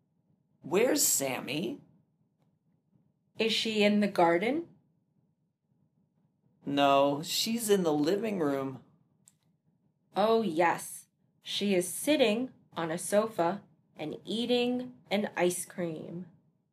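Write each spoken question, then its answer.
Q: Where is Sammy?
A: In the living room, on a sofa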